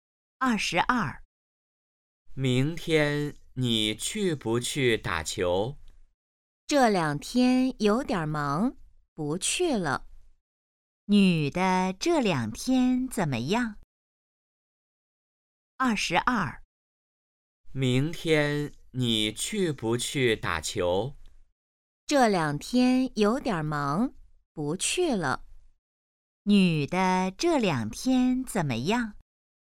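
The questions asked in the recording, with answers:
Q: 女的这两天怎么样?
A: 有点忙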